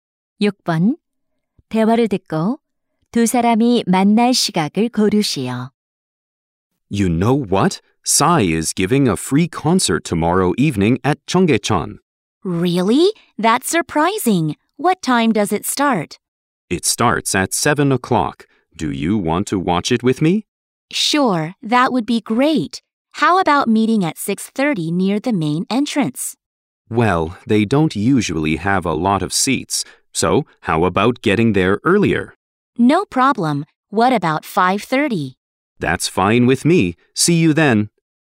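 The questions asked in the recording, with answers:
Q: 대화를 듣고 두 사람이 만날 시각을 고르시오.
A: 5시 30분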